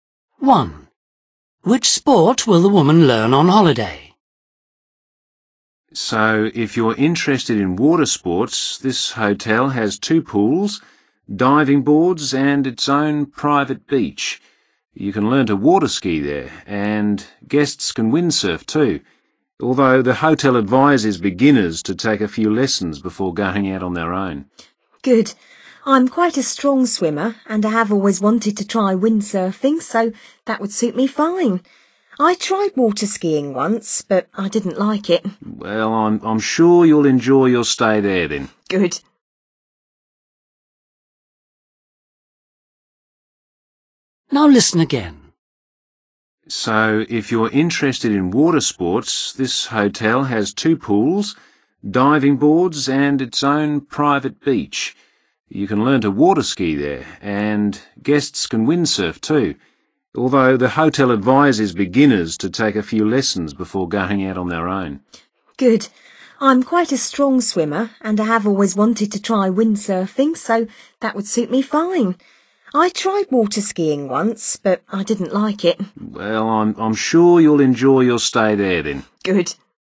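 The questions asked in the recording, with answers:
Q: Which sport will the woman learn on holiday?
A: windsurfing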